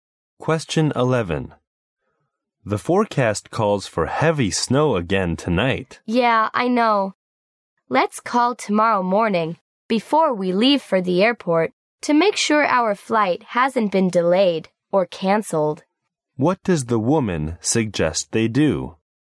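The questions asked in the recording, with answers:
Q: What does the woman suggest they do?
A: Call the airport tomorrow morning to check whether their flight is delayed or canceled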